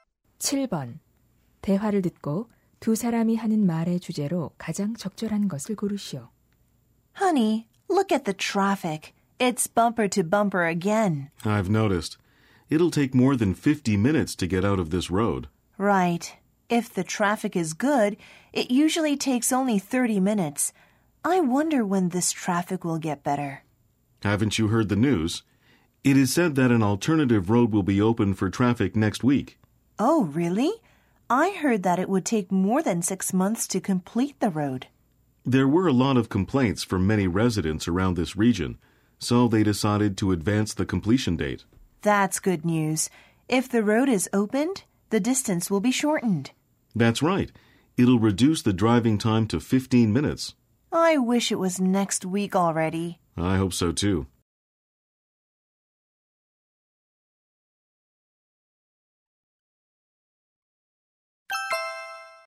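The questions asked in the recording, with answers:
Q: 대화를 듣고 두 사람이 하는 말의 주제로 가장 적절한 것을 고르시오.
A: 교통 체증을 줄여 줄 대체 도로의 조기 개통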